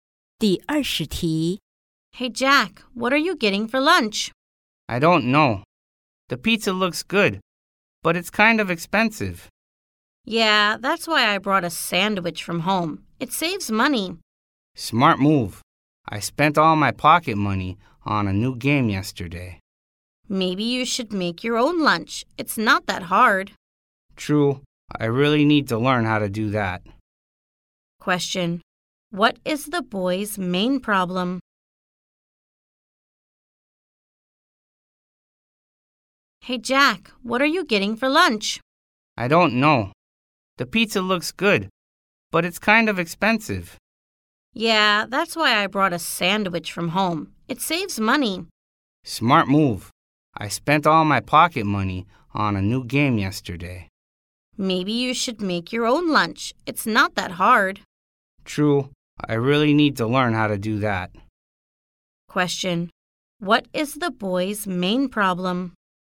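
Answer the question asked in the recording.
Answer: He has no money for lunch because he spent his pocket money on a game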